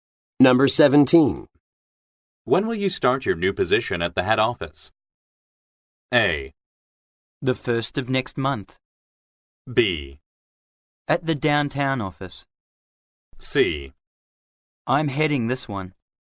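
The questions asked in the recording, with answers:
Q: When will you start your new position at the head office?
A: A: The 1st of next month.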